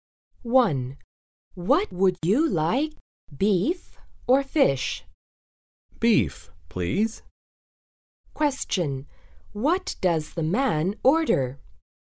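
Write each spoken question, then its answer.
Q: What does the man order?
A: Beef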